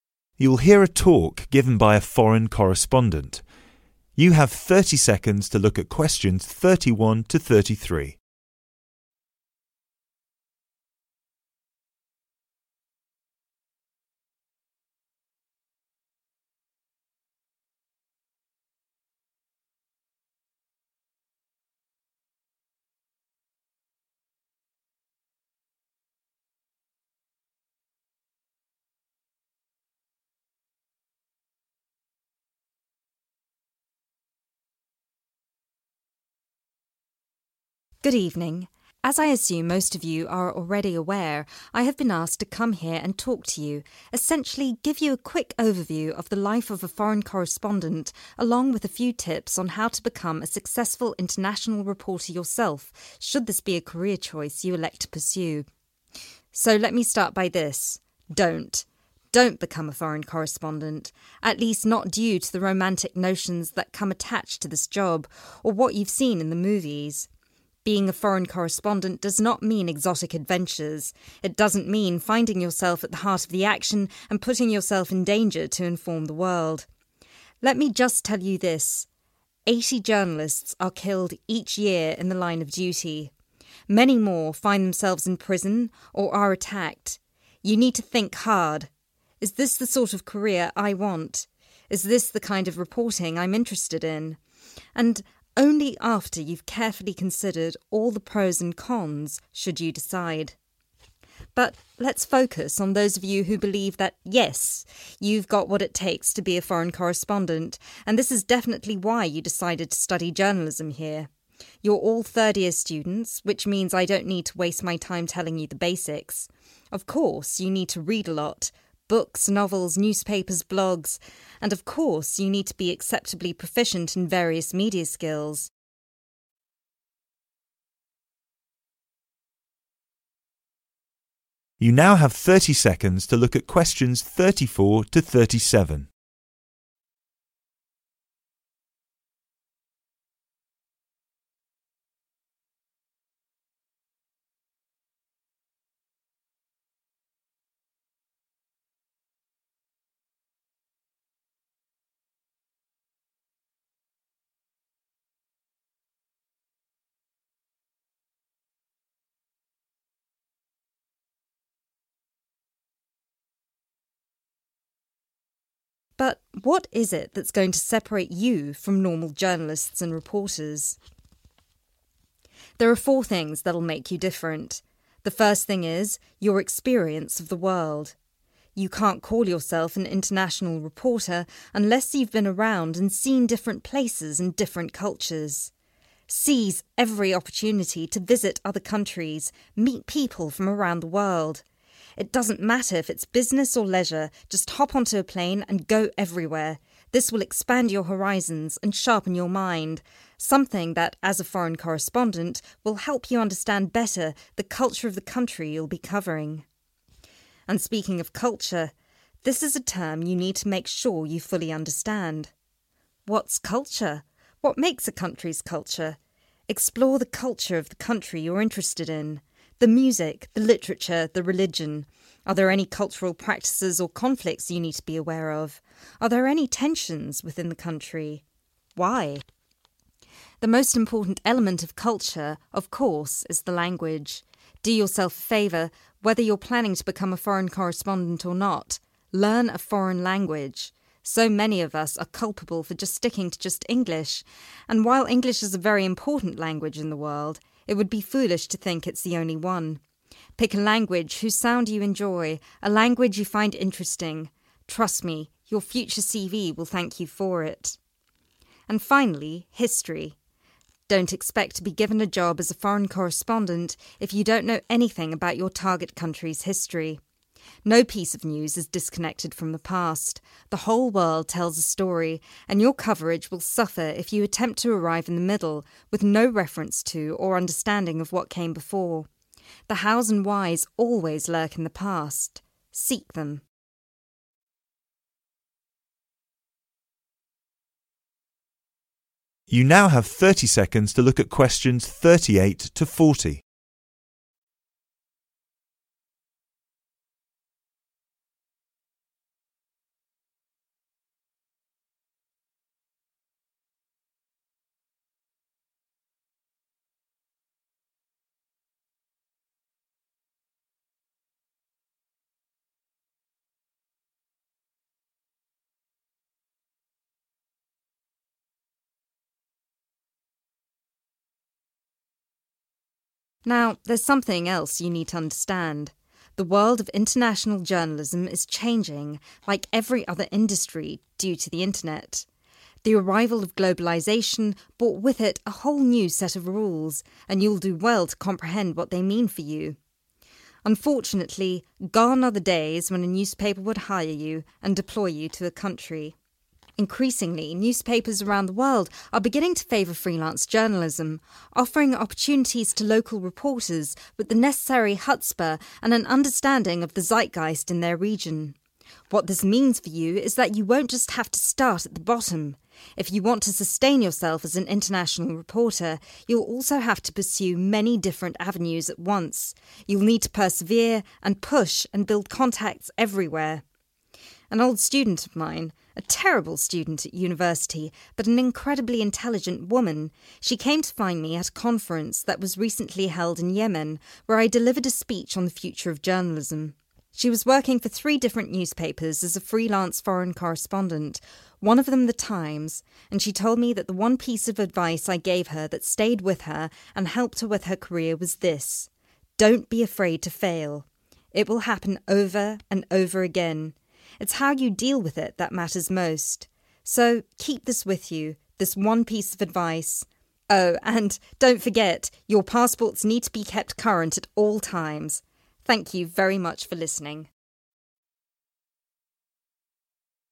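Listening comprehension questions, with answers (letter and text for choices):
Complete the sentences below. Use NO MORE THAN TWO WORDS AND/OR A NUMBER.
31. There are a few about being a foreign correspondent, but they are the wrong reason to choose it as a career.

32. The dangers of being a foreign correspondent lead to the death of per year.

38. Because of recent technological advancements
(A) international journalism is becoming less common.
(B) newspapers are loath to hire journalists on a contract.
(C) newspapers have started to opt for independent foreign correspondents.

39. If foreign correspondents want to earn enough money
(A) they need to learn how to network.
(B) they need to have a second job.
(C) they need to start at the bottom.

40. The speaker's ex-student found which of the following pieces of advice very useful?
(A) "You need to remember to renew your passport."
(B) "You need to learn how to deal with failure."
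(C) "You need to remember that failure is inevitable."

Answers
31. romantic notions
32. 80 journalists
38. (C) newspapers have started to opt for independent foreign correspondents.
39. (A) they need to learn how to network.
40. (B) "You need to learn how to deal with failure."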